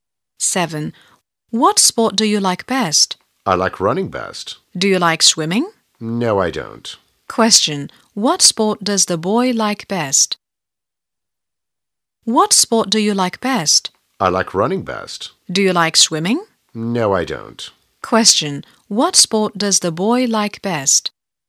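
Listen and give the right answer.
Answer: Running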